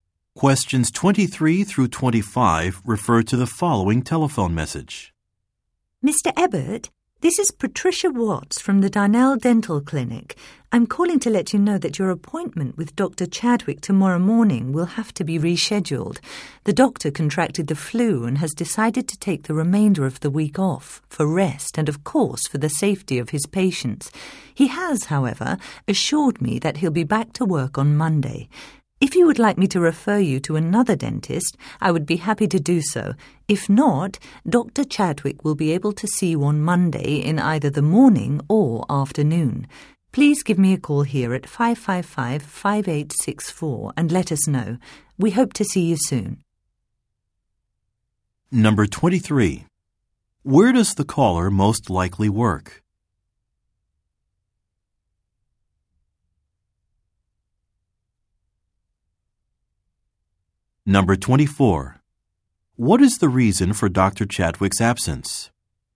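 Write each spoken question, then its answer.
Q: Where does the caller most likely work?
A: At a dental clinic

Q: What is the reason for Dr. Chadwick's absence?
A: He has the flu

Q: What is Mr. Ebert asked to do?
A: Call the clinic back at 555-5864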